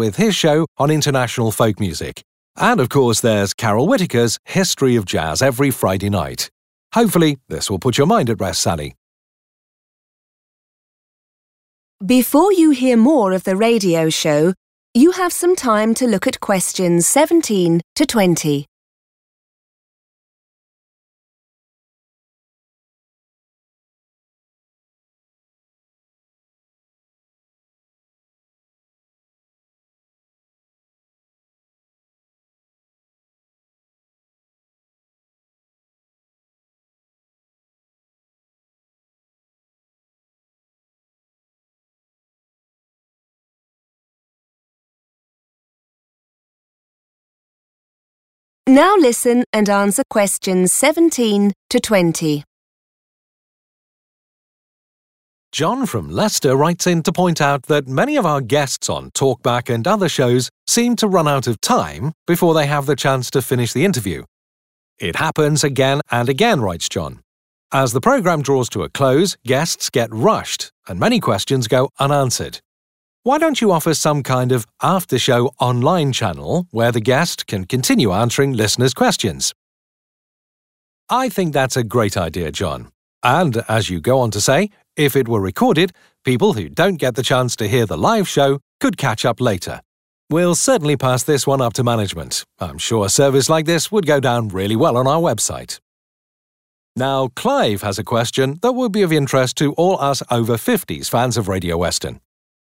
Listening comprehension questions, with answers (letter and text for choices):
Choose the correct letter, A, B or C.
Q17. What does John object to?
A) the time of day the programmes are on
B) the lack of time guests have to answer questions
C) the interviewers' questions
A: B) the lack of time guests have to answer questions

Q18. How does John think the problem could be solved?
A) have further live radio shows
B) put the radio shows on at different times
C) extend the show on the internet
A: C) extend the show on the internet

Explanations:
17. The correct answer is B because John's letter to the radio station explains that guests often "run out of time." He mentions that when shows are almost over, guests are "rushed" and many "questions go unanswered." This shows that his main problem (objection) is the short amount of time available for discussions.
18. The correct answer is C because John mentions a problem where guests on the show are rushed and do not have enough time to finish their interviews or answer all the questions. To fix this, he suggests creating an 'online channel' specifically for after the show. In this context, 'online channel' refers to using the internet to extend the conversation beyond the time limits of the live radio broadcast.

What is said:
'We're force-fed a great deal of pop music throughout the day,' writes Sally, 'and some of your listeners look forward to the more niche musical genres you cover in the evening. Are these in danger when you rearrange the schedule?' Not at all Sally. In fact look out for one or two exciting new shows over the coming weeks. We've got a brand new classical music show coming soon and the return of the ever-popular Chris Greene with his show on international folk music. And of course there's Carol Whittaker's History of Jazz every Friday night. Hopefully this will put your mind at rest, Sally.
John from Leicester writes in to point out that many of our guests on Talk Back and other shows seem to run out of time before they have the chance to finish the interview. 'It happens again and again,' writes John. 'As the programmes draw to a close guests get rushed and many questions go unanswered. Why don't you offer some kind of after-show online channel where the guest can continue answering listeners' questions?' I think that's a great idea John. And as you go on to say, if it were recorded, people who don't get the chance to hear the live show could catch up later. We'll certainly pass this one up to management, I'm sure a service like this would go down really well on our website.
Now Clive has a question that will be of interest to all us over-50s fans of Radio Western.